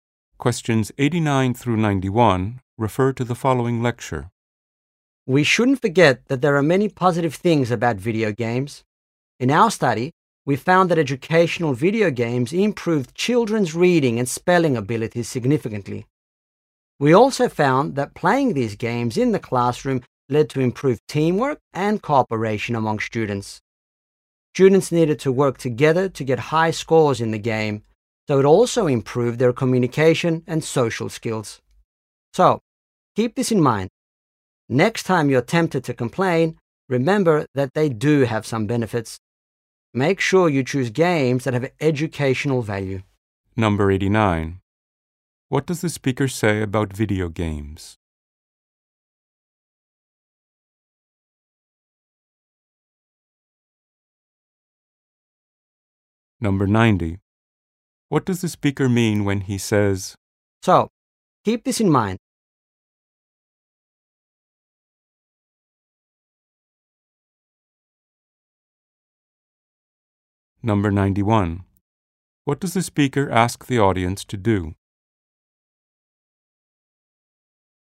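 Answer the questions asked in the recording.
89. Educational games improve reading and spelling
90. Remember that video games have benefits
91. Choose games with educational value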